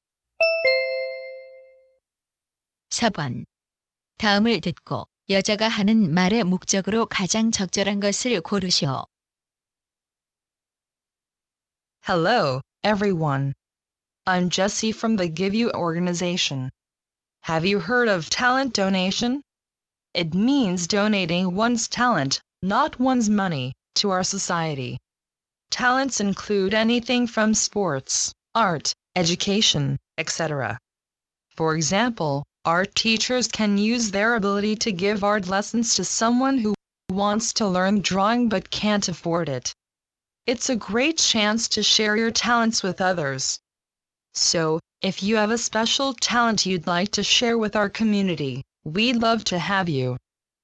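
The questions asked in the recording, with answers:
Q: 다음을 듣고 여자가 하는 말의 목적으로 가장 적절한 것을 고르시오.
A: 재능 기부 참여를 권장하려고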